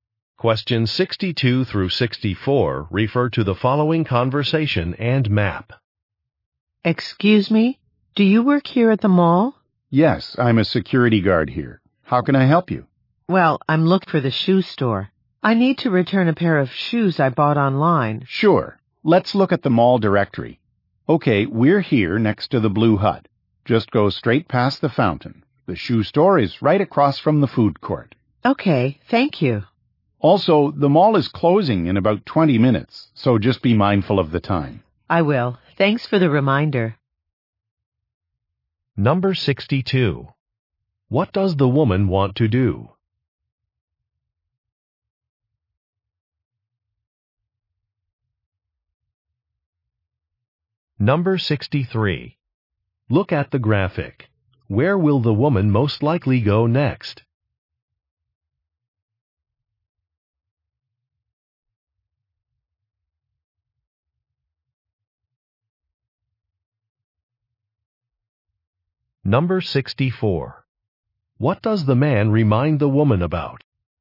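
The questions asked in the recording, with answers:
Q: What does the woman want to do?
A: Return a pair of shoes

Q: What does the man remind the woman about?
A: The mall closes in about 20 minutes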